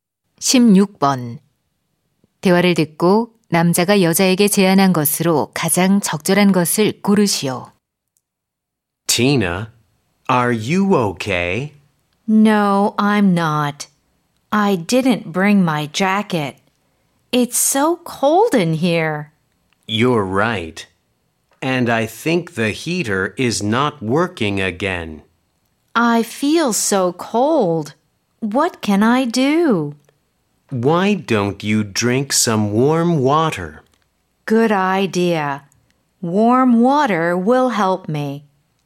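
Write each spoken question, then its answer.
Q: 대화를 듣고 남자가 여자에게 제안한 것으로 가장 적절한 것을 고르시오.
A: 따뜻한 물 마시기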